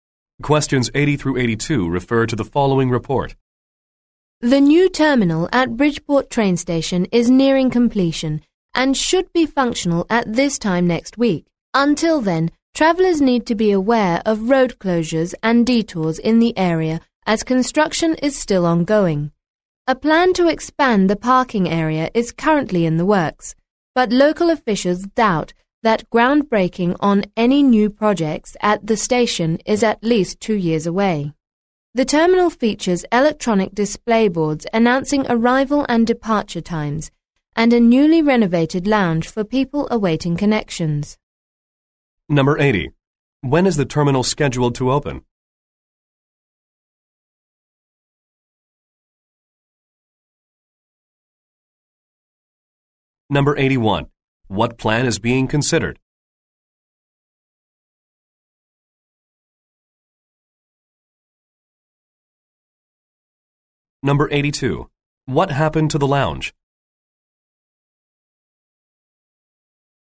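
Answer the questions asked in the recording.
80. Next week
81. Expanding the parking area
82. It was renovated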